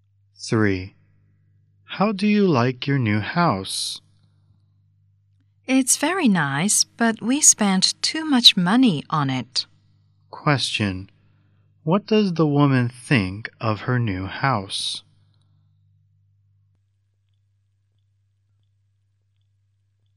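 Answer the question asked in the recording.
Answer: It's very nice but too expensive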